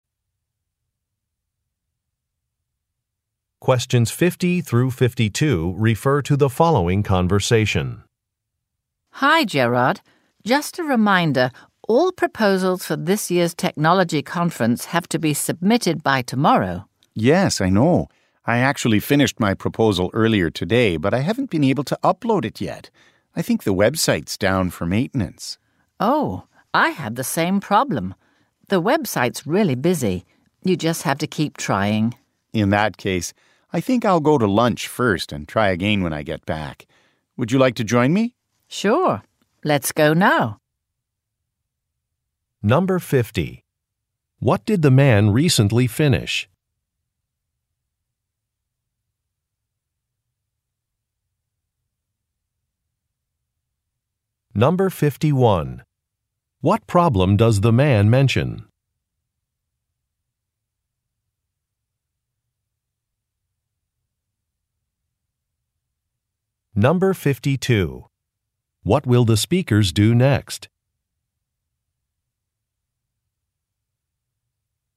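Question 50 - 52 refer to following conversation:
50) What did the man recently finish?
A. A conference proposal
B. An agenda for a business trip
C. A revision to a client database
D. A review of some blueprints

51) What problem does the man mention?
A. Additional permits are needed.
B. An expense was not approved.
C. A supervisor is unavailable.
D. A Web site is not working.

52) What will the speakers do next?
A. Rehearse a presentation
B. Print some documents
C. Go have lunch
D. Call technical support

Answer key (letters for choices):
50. A
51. D
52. C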